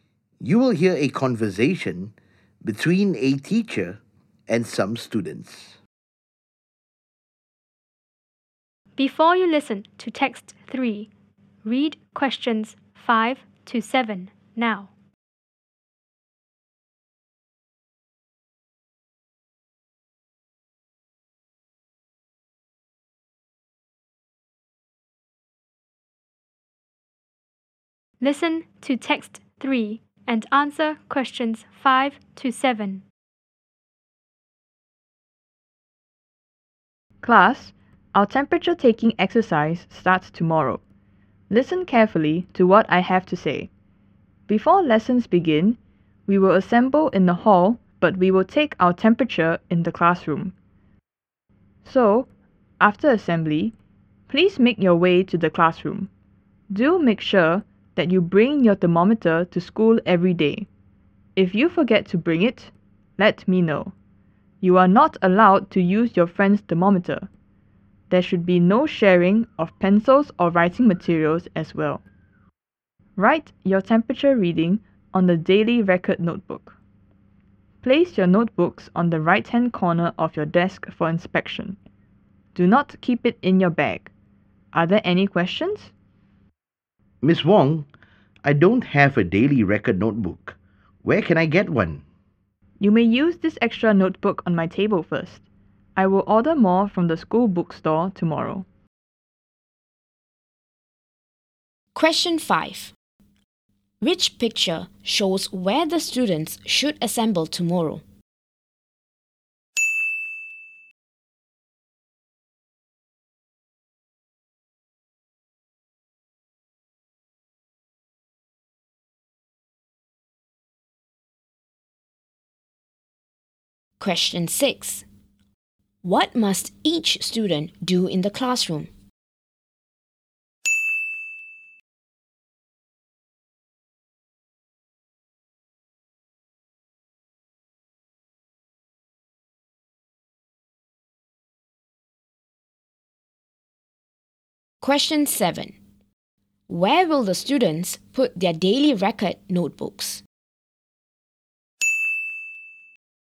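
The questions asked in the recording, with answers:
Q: Where will the students put their daily record notebooks?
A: On the right-hand corner of their desks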